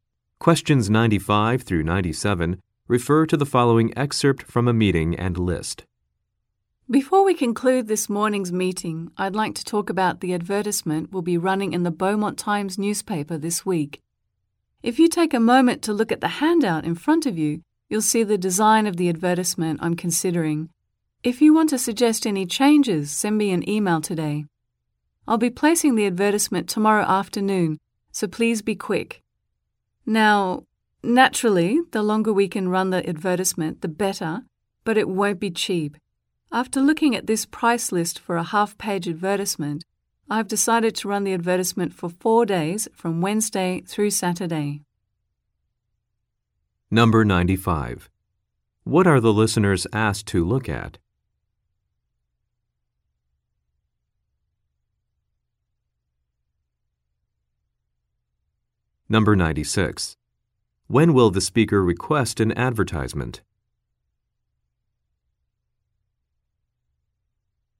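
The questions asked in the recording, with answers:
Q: What are the listeners asked to look at?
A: A handout with the advertisement design

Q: When will the speaker request an advertisement?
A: Tomorrow afternoon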